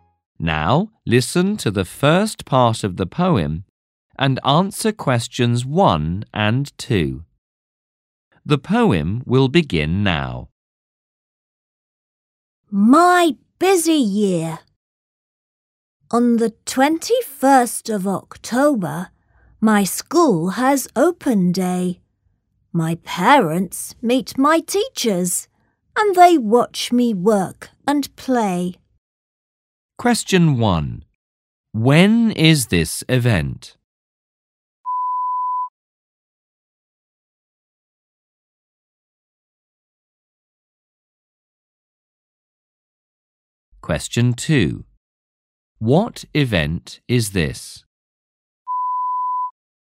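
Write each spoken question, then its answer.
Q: When is this event?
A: On the 21st of October

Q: What event is this?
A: Open day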